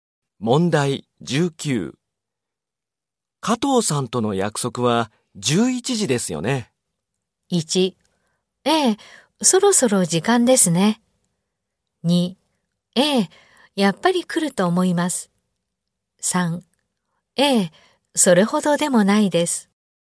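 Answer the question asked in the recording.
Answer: 1: ええ、そろそろ時間ですね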